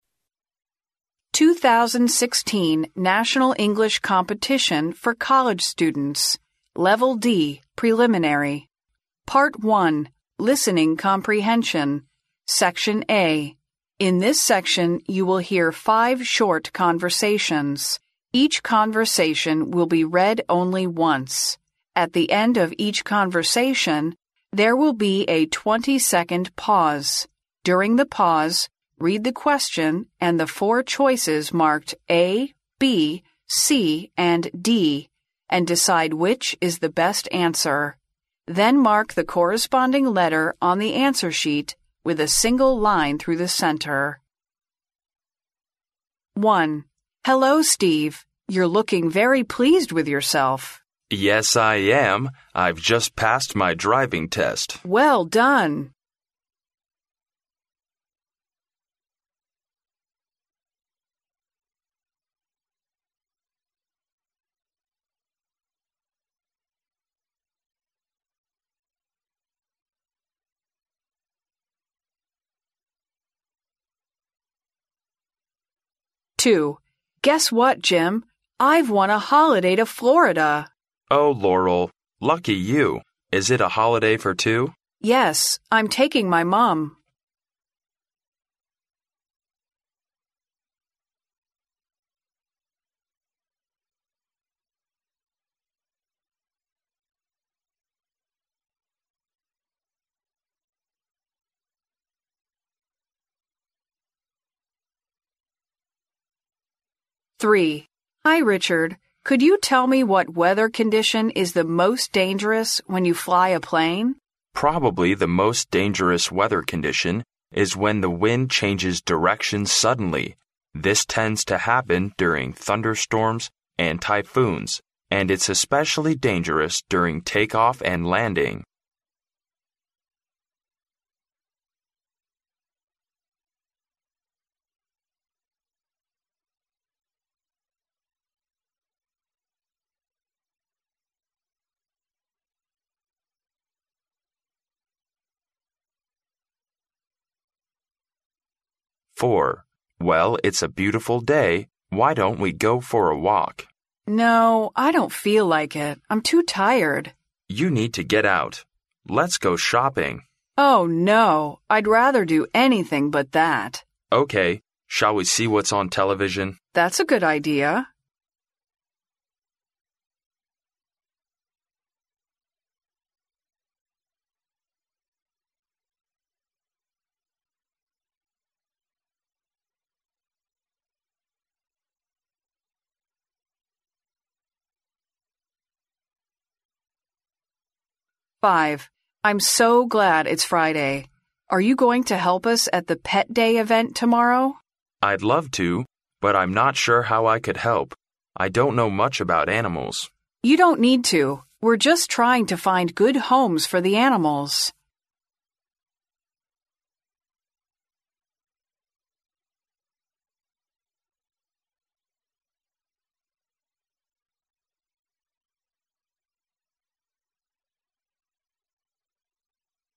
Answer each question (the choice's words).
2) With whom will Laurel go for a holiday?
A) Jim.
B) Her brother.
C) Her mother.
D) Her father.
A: Her mother.

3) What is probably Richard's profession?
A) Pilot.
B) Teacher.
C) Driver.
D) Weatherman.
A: Pilot.

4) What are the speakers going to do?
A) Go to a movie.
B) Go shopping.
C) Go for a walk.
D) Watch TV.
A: Watch TV.

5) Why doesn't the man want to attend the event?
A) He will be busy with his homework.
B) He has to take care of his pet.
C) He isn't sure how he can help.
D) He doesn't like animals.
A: He isn't sure how he can help.

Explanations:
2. 录音中当男士问女士Laurel,假期是否可以两个人一起去时,女士回答到"Yes, I'm taking my mum."由此可知,Laurel将和自己的妈妈一起去度假。故选C项。
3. 录音中女士问男士Richard,他开飞机时遇到的最危险的天气状况是什么。由关键词"fly a plane"可知,Richard是一名飞行员。故选A项。
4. 录音中男士不断提出建议,但是最开始女士都给予了否定,最后,男士提议要不要一起看电视,对此女士表示同意。由此可知,D项正确。
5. 录音中,男士说道,"I'd love to, but I'm not sure how I could help."由此可知,男士虽然想去,但是不确定如何来帮忙。由此可知,C项正确。